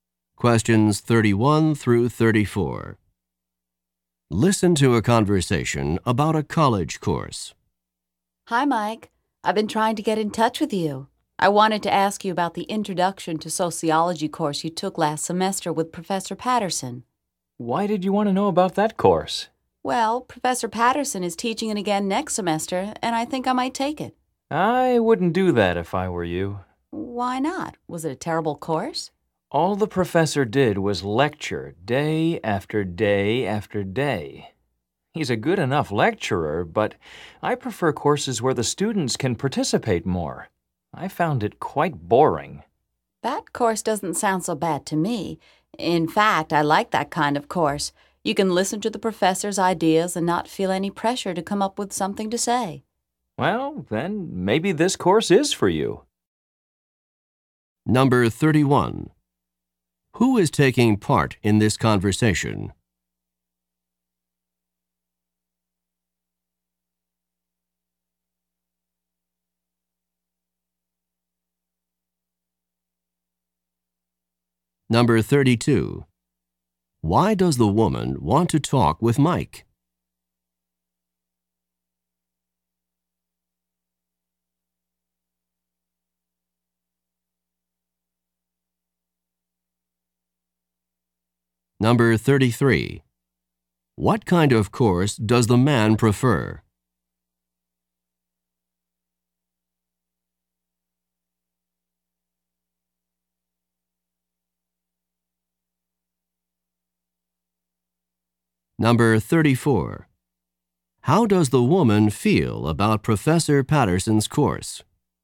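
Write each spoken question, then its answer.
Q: Why does the woman want to talk with Mike?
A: To ask about the Introduction to Sociology course he took with Professor Patterson

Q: What kind of course does the man prefer?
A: Courses where students can participate more

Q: How does the woman feel about Professor Patterson's course?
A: She thinks it sounds good; she likes that kind of course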